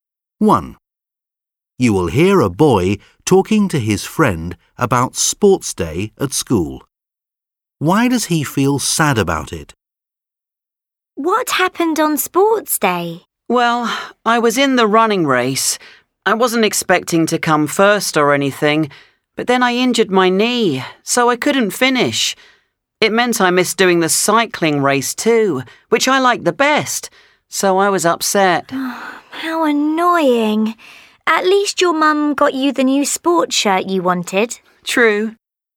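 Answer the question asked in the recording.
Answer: He hurt his knee and missed the cycling race, his favourite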